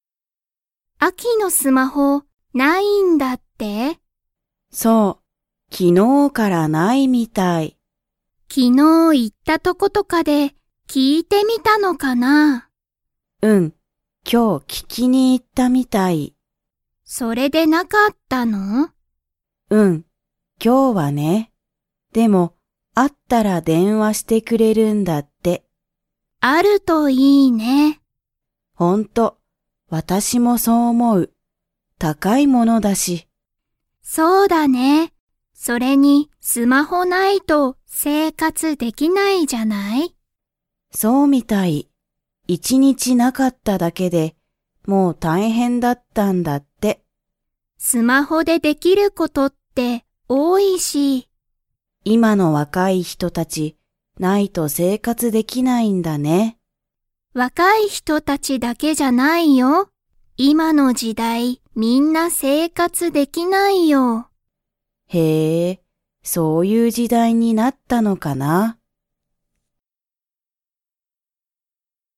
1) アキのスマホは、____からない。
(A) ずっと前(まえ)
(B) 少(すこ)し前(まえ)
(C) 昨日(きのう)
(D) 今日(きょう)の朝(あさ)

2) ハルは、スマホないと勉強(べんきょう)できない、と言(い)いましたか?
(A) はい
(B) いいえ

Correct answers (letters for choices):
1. C
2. B

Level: Level 2